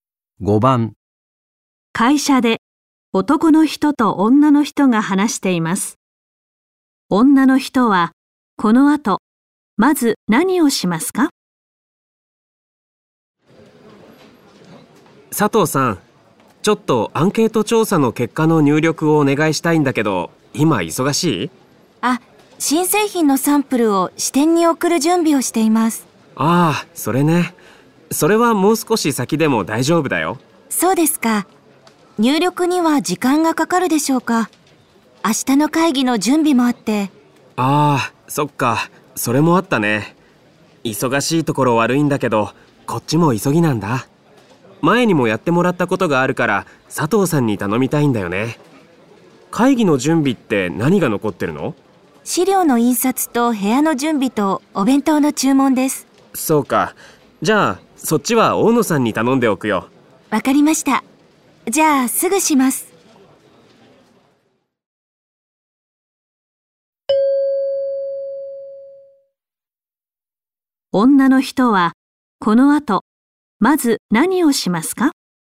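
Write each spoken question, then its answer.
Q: 女の人はこの後まず何をしますか?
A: アンケート調査の結果を入力する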